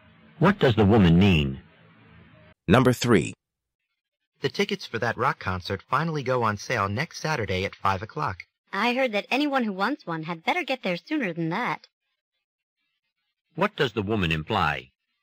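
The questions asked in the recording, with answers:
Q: What does the woman imply?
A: People should arrive well before 5 o'clock to get tickets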